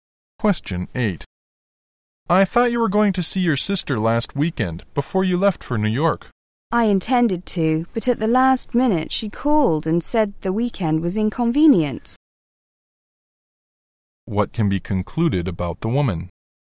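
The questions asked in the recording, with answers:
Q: What can be concluded about the woman?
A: She did not see her sister last weekend.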